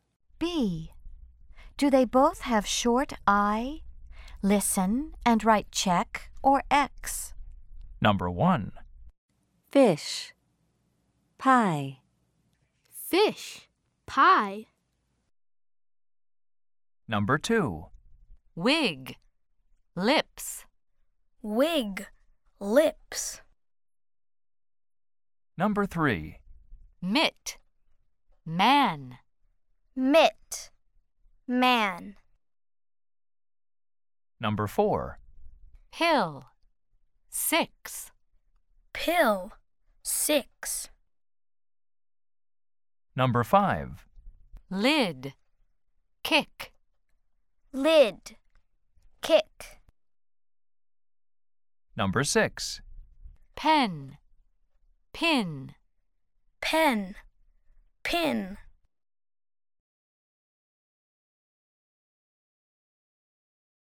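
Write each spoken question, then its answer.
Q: Do they both have short I?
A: No (fish, pie)

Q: Do they both have short I?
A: Yes (wig, lips)

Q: Do they both have short I?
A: No (mitt, man)

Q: Do they both have short I?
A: Yes (pill, six)

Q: Do they both have short I?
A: Yes (lid, kick)

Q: Do they both have short I?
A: No (pen, pin)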